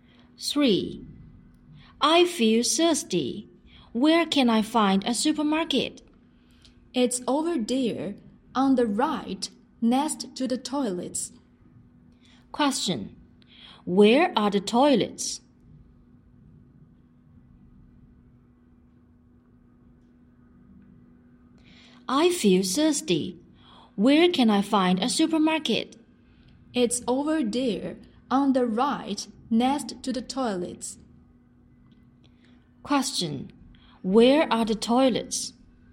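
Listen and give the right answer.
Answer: Over there, on the right, next to the supermarket.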